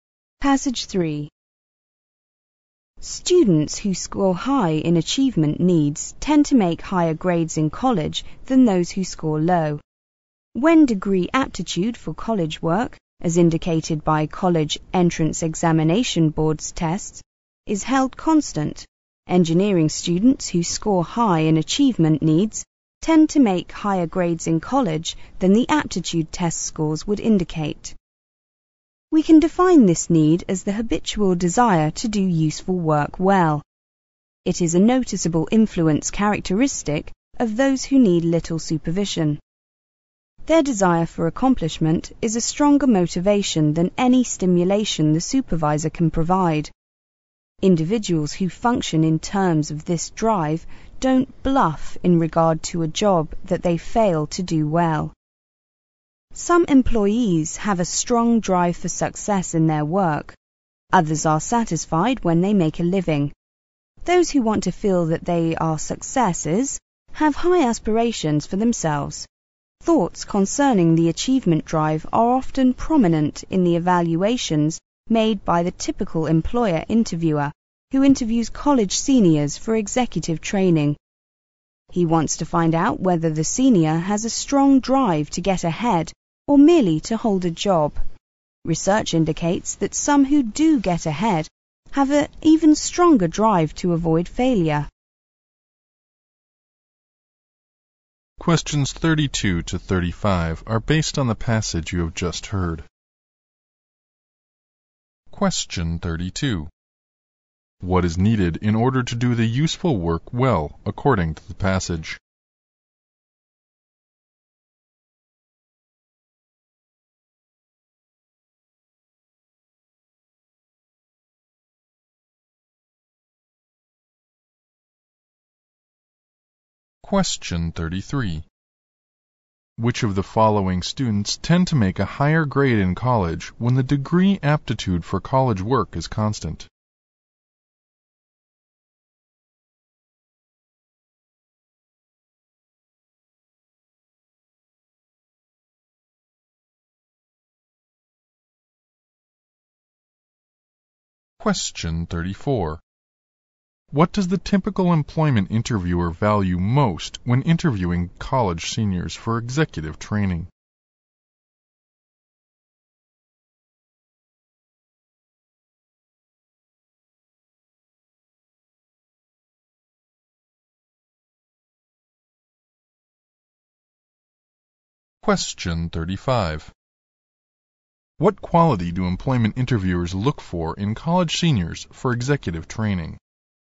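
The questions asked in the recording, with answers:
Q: Which of the following students tend to make a higher grade in college when the degree aptitude for college work is constant?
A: Those who score high in achievement needs

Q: What does the typical employment interviewer value most when interviewing college seniors for executive training?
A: A strong drive to get ahead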